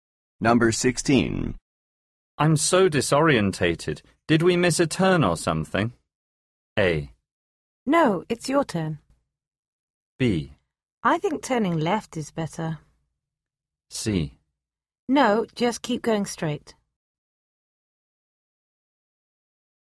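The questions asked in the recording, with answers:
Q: I'm so disorientated. Did we miss a turn or something?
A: C: No, just keep going straight.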